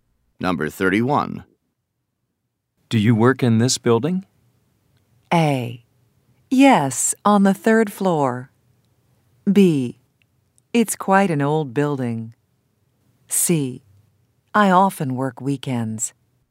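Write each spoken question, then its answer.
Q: Do you work in this building?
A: A: Yes, on the 3rd floor.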